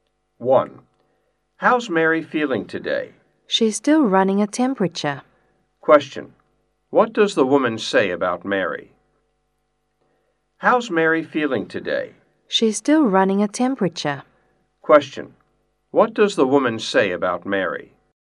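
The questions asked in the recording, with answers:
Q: What does the woman say about Mary?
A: She still has a fever (is running a temperature)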